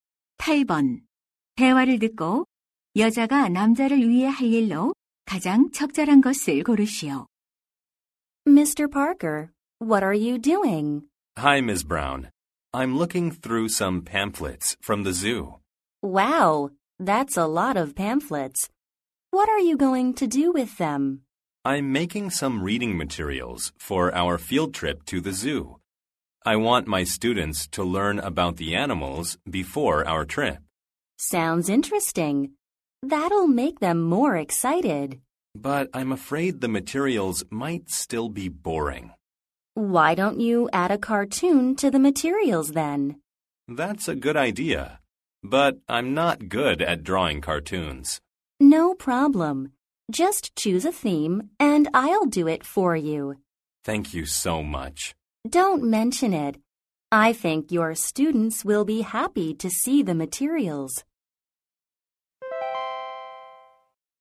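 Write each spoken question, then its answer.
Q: 대화를 듣고 여자가 남자를 위해 할 일로 가장 적절한 것을 고르시오.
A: 읽기 자료에 넣을 만화 그려 주기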